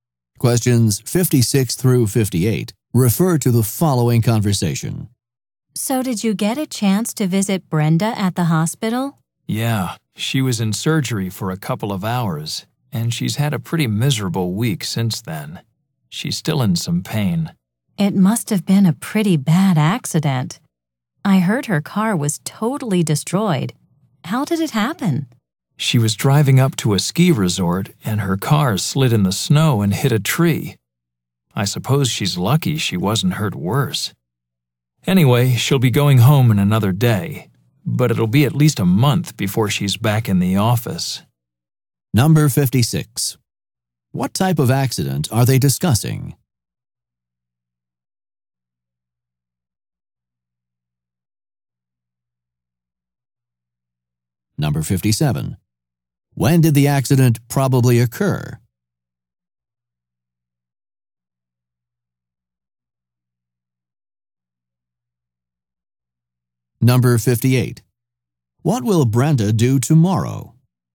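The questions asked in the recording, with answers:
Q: What type of accident are they discussing?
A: A car accident

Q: What will Brenda do tomorrow?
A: Go home from the hospital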